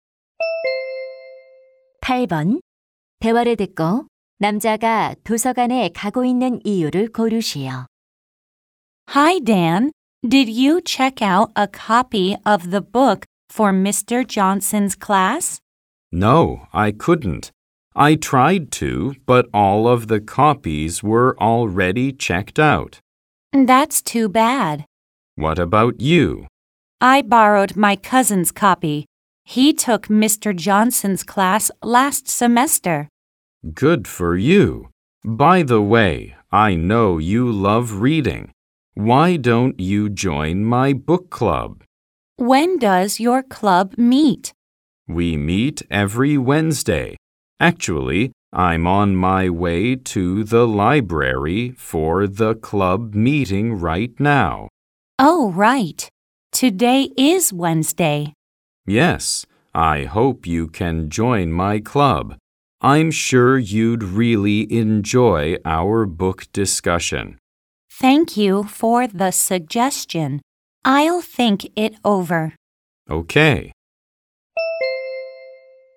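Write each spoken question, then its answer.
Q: 대화를 듣고 남자가 도서관에 가고 있는 이유를 고르시오.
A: 독서 동아리 모임에 참석하려고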